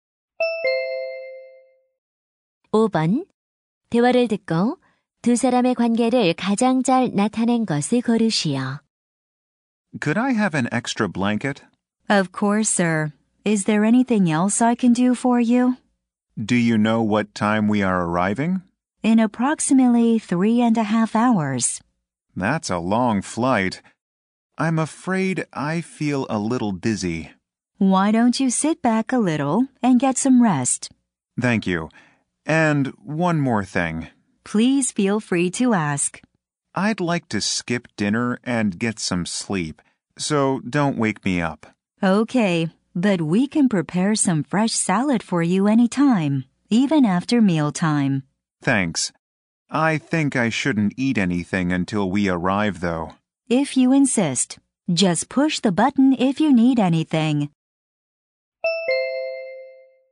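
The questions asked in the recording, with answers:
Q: 대화를 듣고 두 사람의 관계를 가장 잘 나타낸 것을 고르시오.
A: 승무원과 승객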